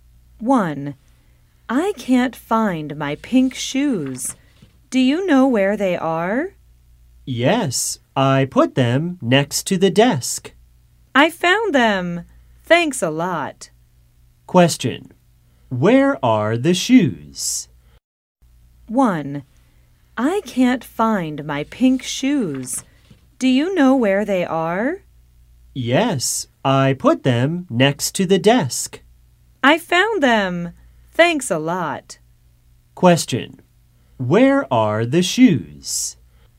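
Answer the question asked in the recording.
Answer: Next to the desk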